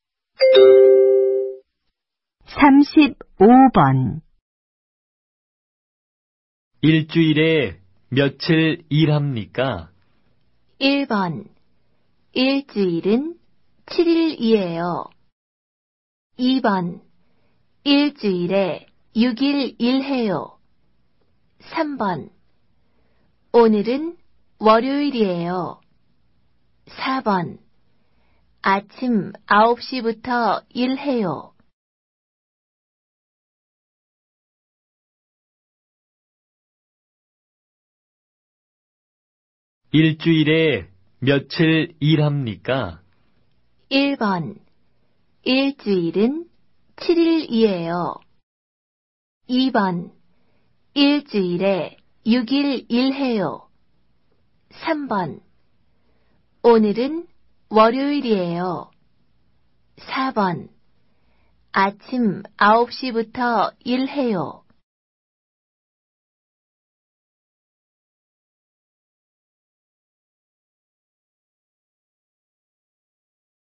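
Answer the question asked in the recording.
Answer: 2: 일주일에 6일 일해요.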